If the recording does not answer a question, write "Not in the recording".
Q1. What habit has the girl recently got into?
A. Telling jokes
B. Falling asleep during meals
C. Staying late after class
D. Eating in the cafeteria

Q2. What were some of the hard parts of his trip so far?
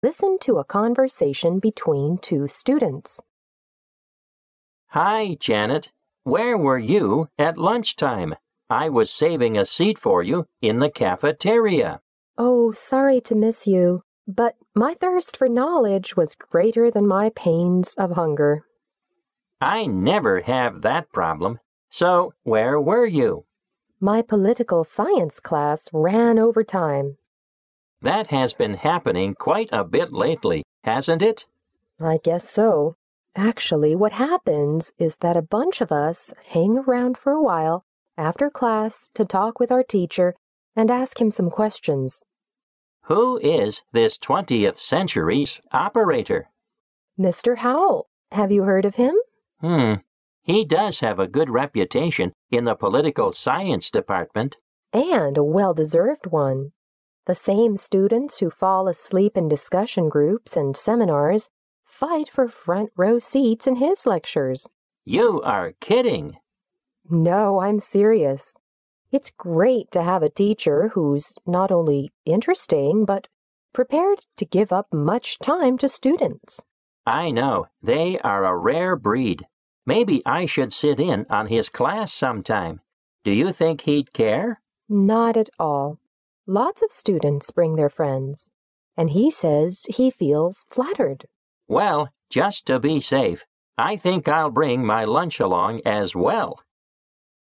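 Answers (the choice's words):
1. Staying late after class
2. Not in the recording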